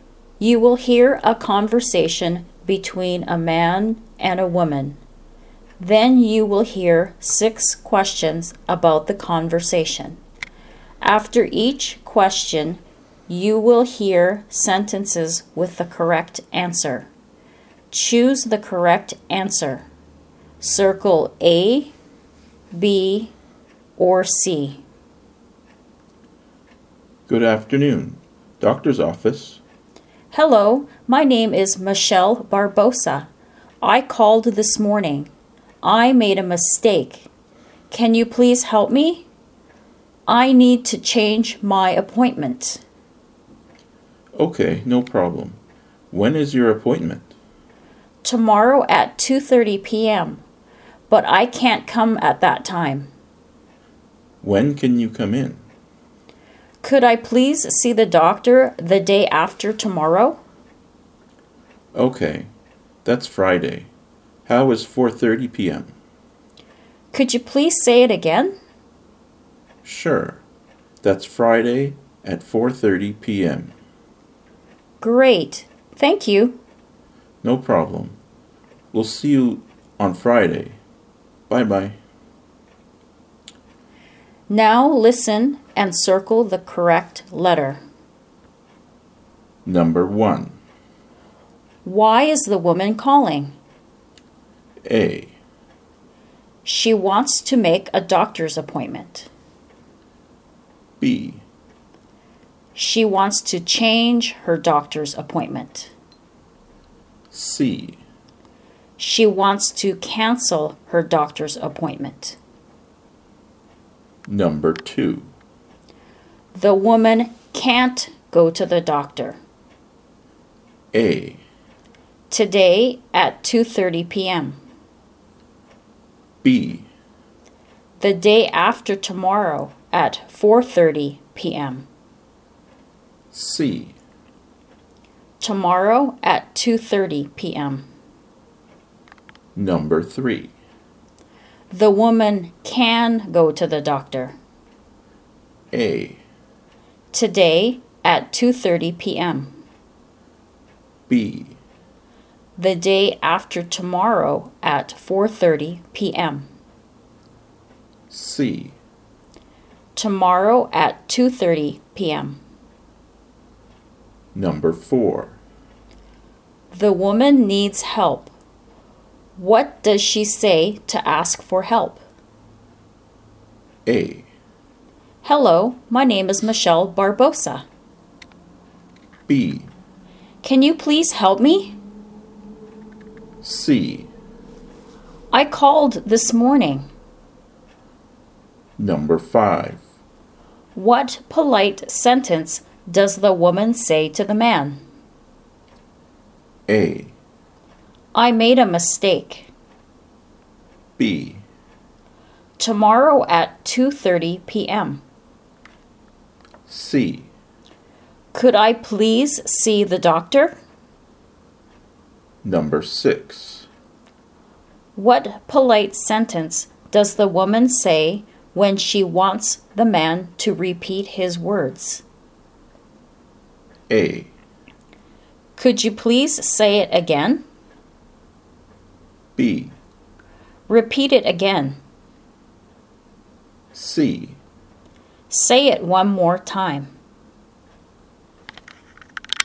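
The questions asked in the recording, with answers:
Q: Why is the woman calling?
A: B: She wants to change her doctor's appointment.

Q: The woman can't go to the doctor.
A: C: Tomorrow at 2:30 p.m.

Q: The woman can go to the doctor.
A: B: The day after tomorrow at 4:30 p.m.

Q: The woman needs help. What does she say to ask for help?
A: B: Can you please help me?

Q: What polite sentence does the woman say to the man?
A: C: Could I please see the doctor?

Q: What polite sentence does the woman say when she wants the man to repeat his words?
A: A: Could you please say it again?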